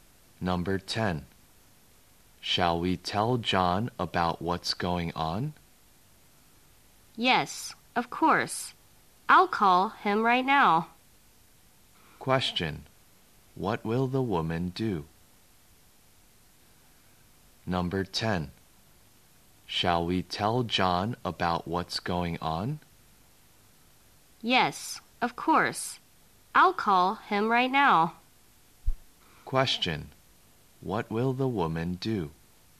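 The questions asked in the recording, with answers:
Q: What will the woman do?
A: Call John right now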